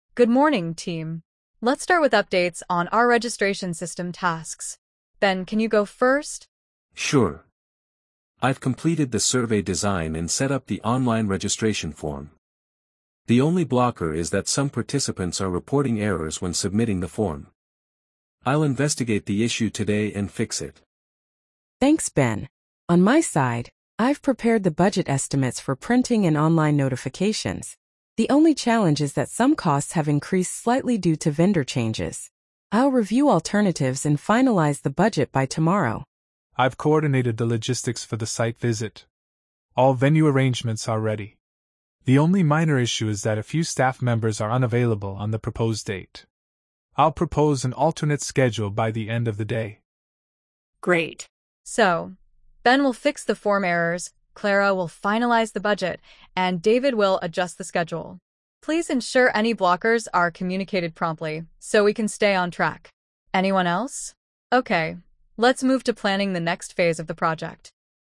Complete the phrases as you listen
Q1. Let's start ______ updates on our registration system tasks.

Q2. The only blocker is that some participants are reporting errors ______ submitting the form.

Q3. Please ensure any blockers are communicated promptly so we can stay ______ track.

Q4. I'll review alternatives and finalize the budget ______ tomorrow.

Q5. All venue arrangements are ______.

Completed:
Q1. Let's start with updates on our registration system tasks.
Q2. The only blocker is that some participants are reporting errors when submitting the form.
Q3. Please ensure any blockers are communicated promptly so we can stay on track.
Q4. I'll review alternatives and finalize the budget by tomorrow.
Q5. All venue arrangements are ready.

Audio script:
ANNA: Good morning, team. Let's start with updates on our registration system tasks. Ben, can you go first?
BEN: Sure. I've completed the survey design and set up the online registration form. The only blocker is that some participants are reporting errors when submitting the form. I'll investigate the issue today and fix it.
CLARA: Thanks, Ben. On my side, I've prepared the budget estimates for printing and online notifications. The only challenge is that some costs have increased slightly due to vendor changes. I'll review alternatives and finalize the budget by tomorrow.
DAVID: I've coordinated the logistics for the site visit. All venue arrangements are ready. The only minor issue is that a few staff members are unavailable on the proposed date. I'll propose an alternate schedule by the end of the day.
ANNA: Great. So, Ben will fix the form errors, Clara will finalize the budget, and David will adjust the schedule. Please ensure any blockers are communicated promptly so we can stay on track. Anyone else? Okay, let's move to planning the next phase of the project.